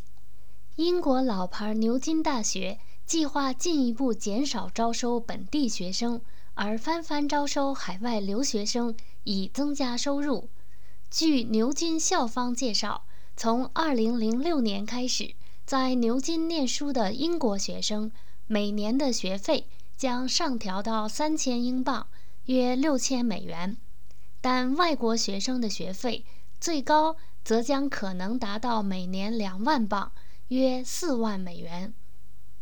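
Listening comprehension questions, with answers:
Please answer the following questions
In 2006, how much tuition fee will British students have to pay at the University of Oxford?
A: £3,000 (about US$6,000) a year

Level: M.Phil Year 2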